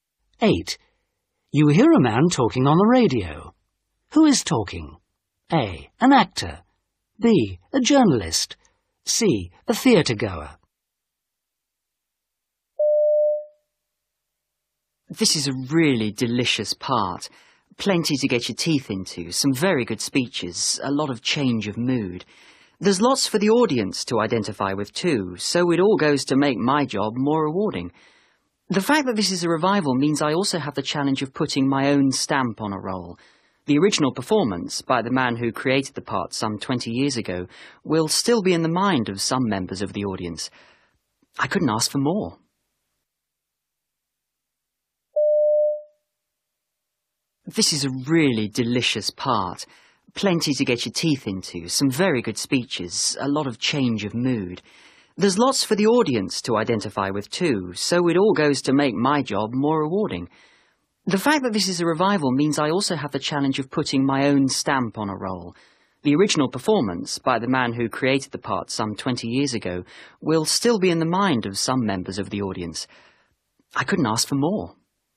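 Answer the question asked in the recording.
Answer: A: An actor.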